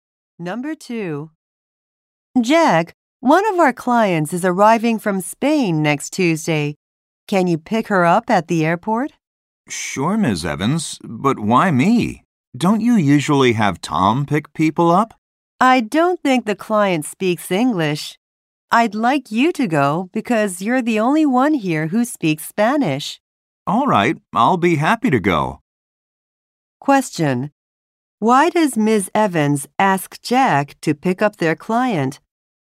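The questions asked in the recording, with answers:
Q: Why does Ms. Evans ask Jack to pick up their client?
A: He is the only one who speaks Spanish.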